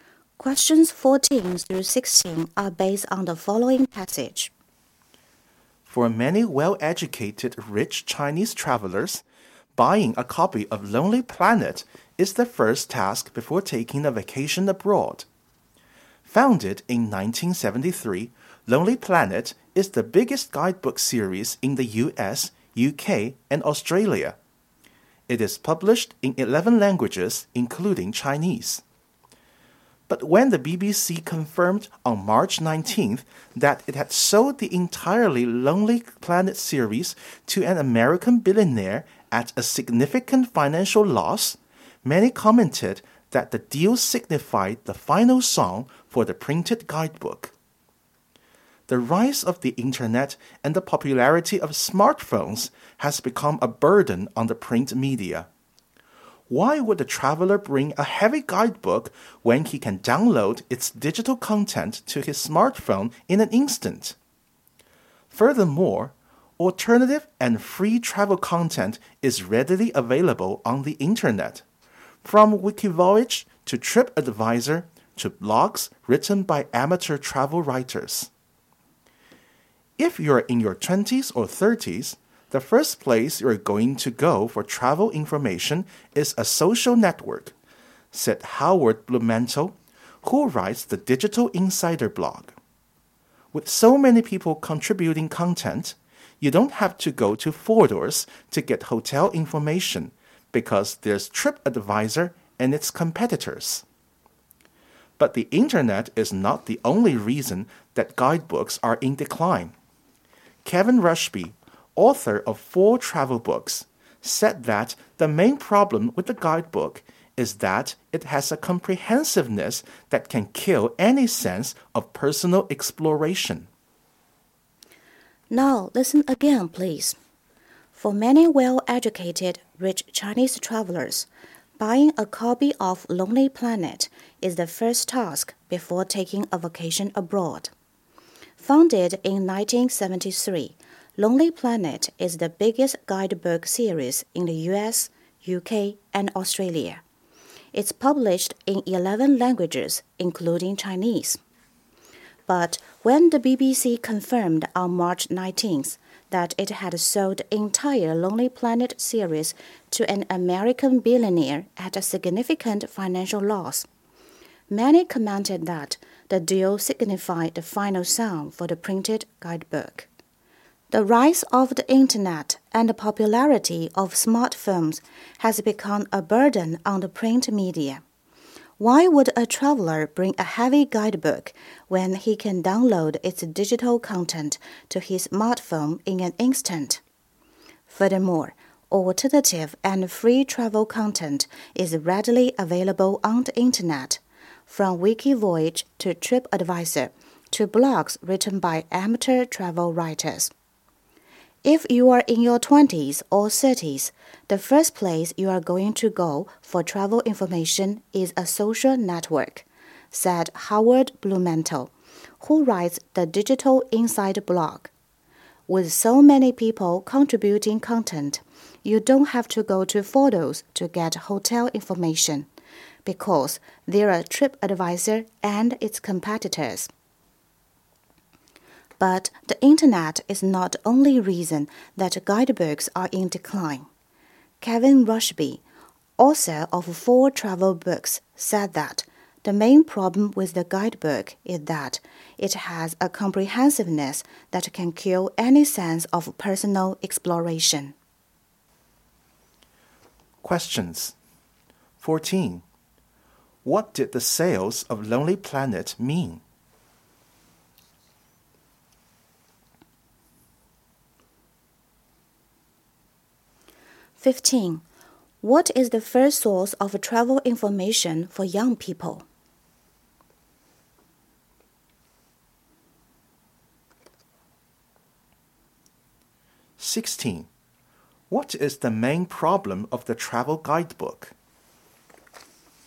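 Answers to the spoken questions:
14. The end of the printed guidebook
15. Social networks
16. Its comprehensiveness kills any sense of personal exploration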